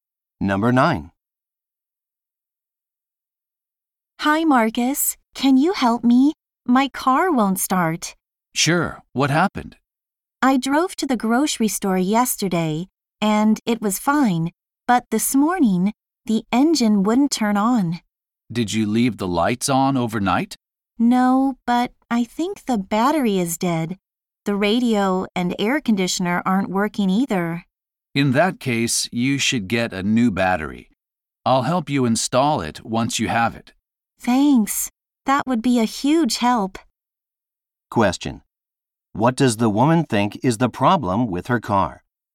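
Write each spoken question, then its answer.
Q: What does the woman think is the problem with her car?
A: The battery is dead.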